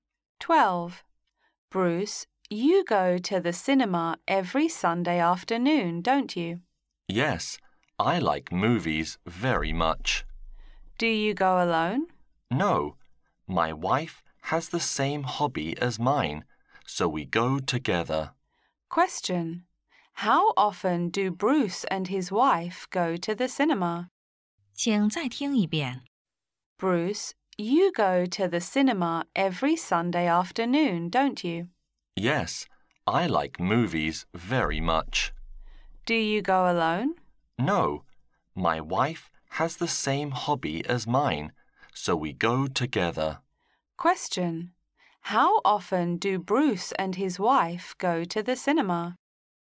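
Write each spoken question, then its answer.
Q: How often do Bruce and his wife go to the cinema?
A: Every Sunday afternoon (once a week)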